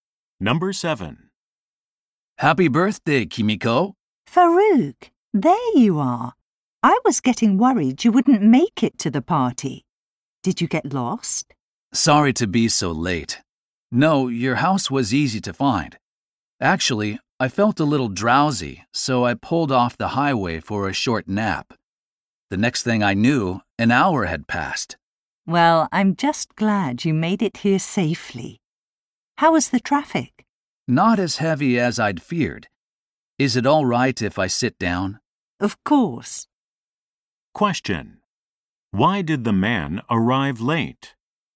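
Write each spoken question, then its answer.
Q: Why did the man arrive late?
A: He stopped for a nap and slept for an hour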